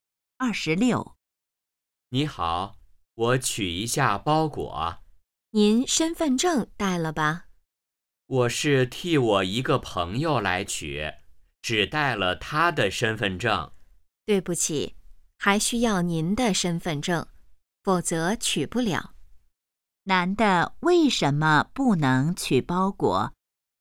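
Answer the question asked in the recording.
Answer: 没带自己的身份证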